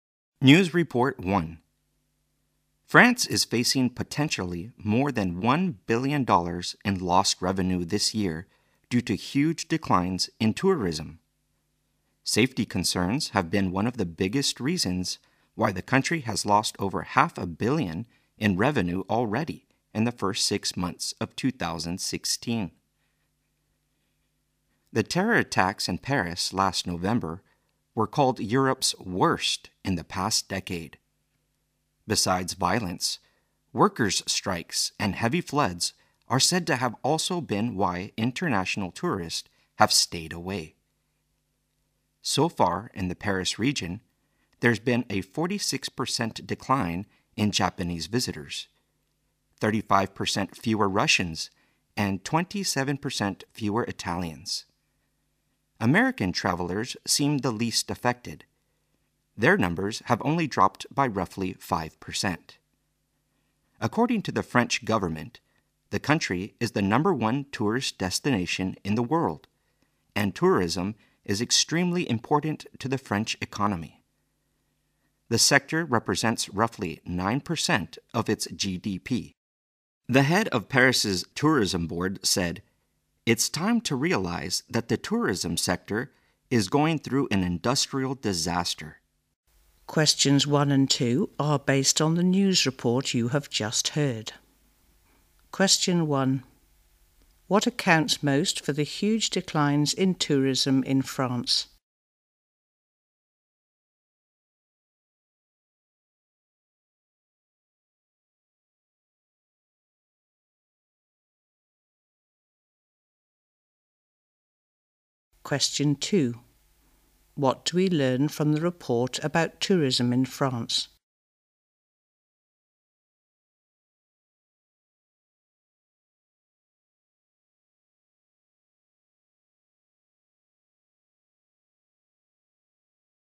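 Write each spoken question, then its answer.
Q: What accounts most for the huge declines in tourism in France?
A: Safety concerns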